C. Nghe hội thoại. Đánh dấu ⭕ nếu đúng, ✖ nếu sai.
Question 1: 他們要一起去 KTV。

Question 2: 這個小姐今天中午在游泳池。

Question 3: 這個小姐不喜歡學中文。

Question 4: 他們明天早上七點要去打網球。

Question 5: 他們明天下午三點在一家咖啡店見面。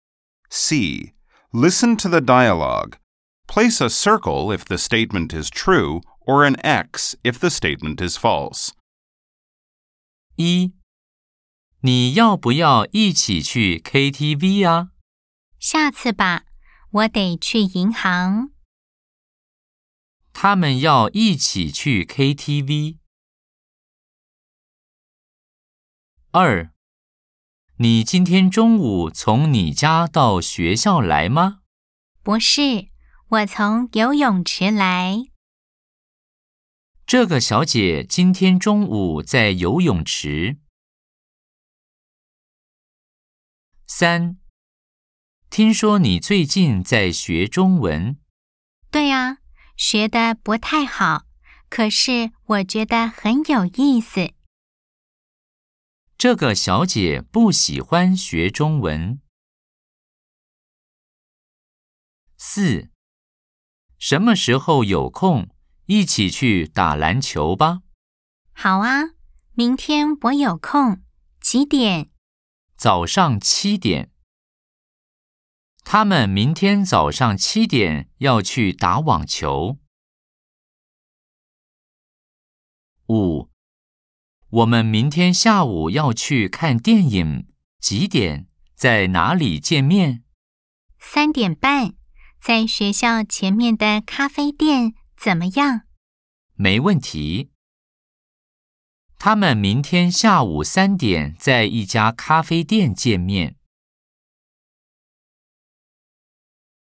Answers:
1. X
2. O
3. X
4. X
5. X